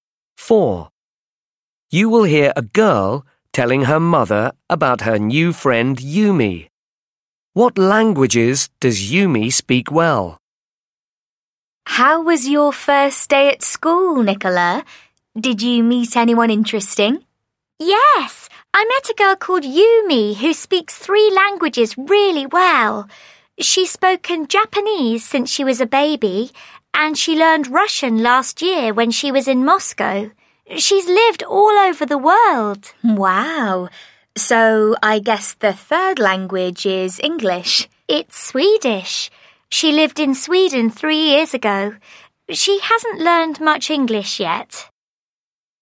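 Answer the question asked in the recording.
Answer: Japanese, Russian and Swedish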